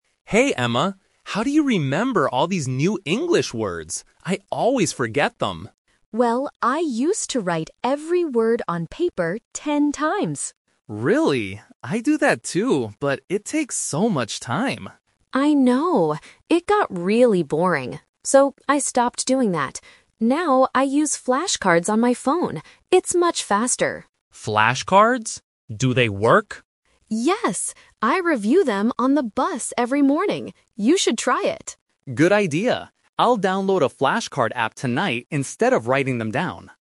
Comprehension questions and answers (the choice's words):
Listen to the conversation and circle the correct answer (A, B, or C).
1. What is Alex's main problem?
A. He forgets new vocabulary.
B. He lost his flashcards.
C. He misses the morning bus.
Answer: He forgets new vocabulary.

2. How did Emma study words in the past?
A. By reading books on the bus.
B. By using flashcards on her phone.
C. By writing them on paper.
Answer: By writing them on paper.

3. What will Alex do tonight?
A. Write his words ten times.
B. Download a new app.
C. Buy some paper flashcards.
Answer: Download a new app.

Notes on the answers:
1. Alex explicitly states his problem at the beginning: "how do you remember all these new English words? I always forget them!"
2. Emma says, "I used to write every word on paper ten times." "Used to" means she did this in the past.
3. At the end of the conversation, Alex decides to change his method and says, "I'll download a flashcard app tonight."

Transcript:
Alex: Hey Emma, how do you remember all these new English words? I always forget them!
Emma: Well, I used to write every word on paper ten times.
Alex: Really? I do that too, but it takes so much time.
Emma: I know. It got really boring. So, I stopped doing that. Now, I use flashcards on my phone. It's much faster.
Alex: Flashcards? Do they work?
Emma: Yes! I review them on the bus every morning. You should try it.